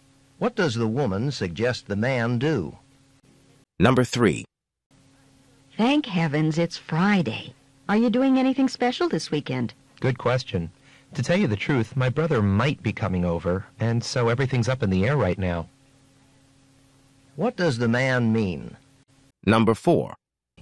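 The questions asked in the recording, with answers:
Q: What does the man mean?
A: His weekend plans are not decided yet.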